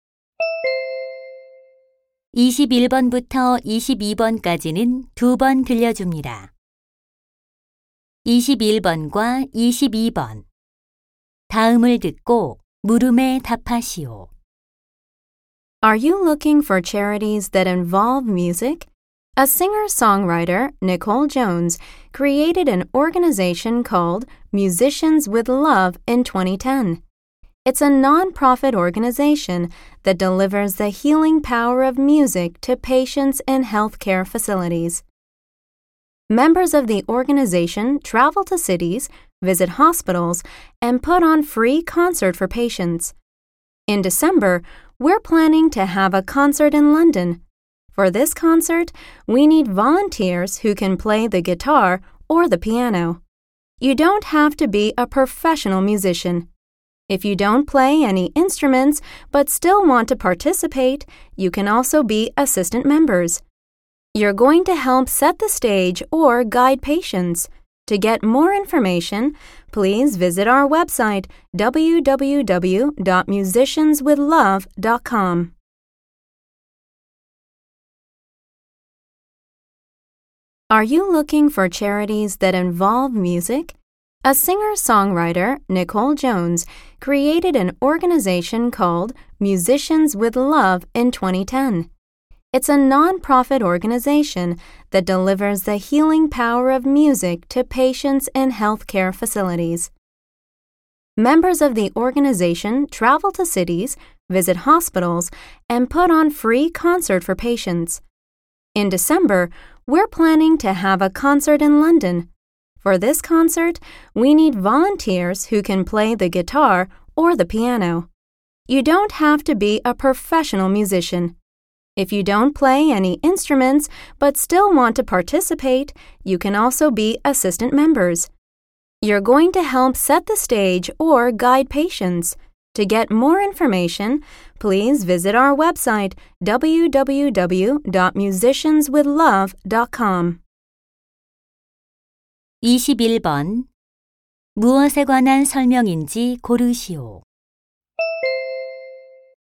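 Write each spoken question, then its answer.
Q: 21번 무엇에 관한 설명인지 고르시오.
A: 환자를 위한 음악 자선 단체 Musicians with Love 소개 및 자원봉사자 모집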